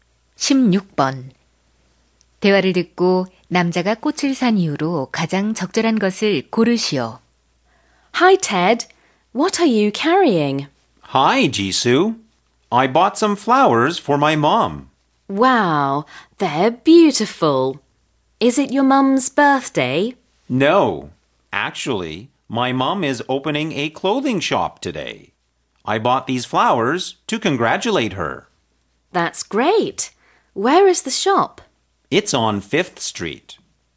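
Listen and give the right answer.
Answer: 엄마의 옷가게 개업을 축하하려고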